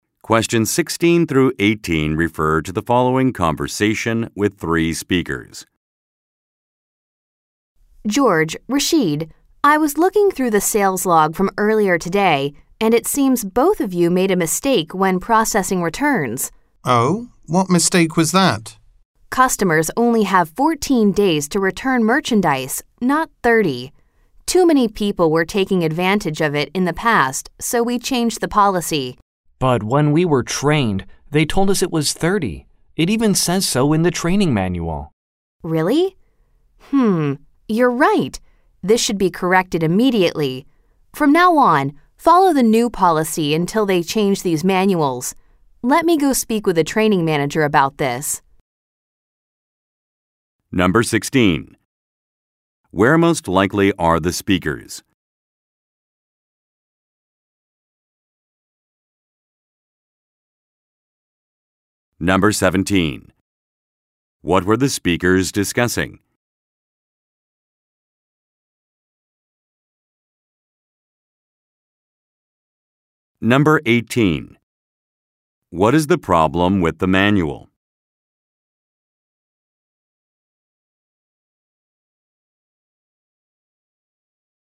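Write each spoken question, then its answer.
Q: What were the speakers discussing?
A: Mistakes in processing returns under the new return policy

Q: What is the problem with the manual?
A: It is out of date: it says 30 days for returns instead of 14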